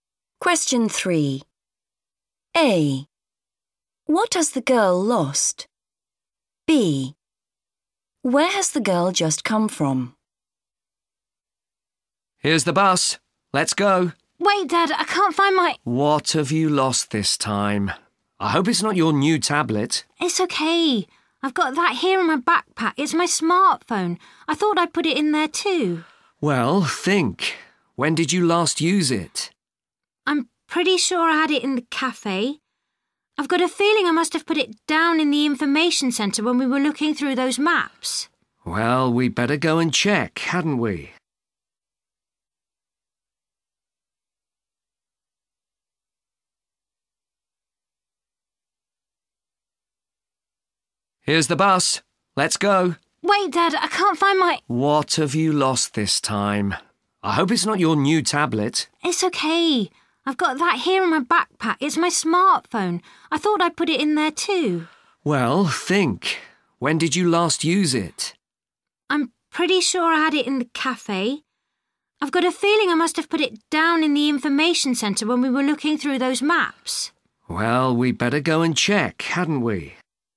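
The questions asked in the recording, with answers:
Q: What has the girl lost?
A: Her smartphone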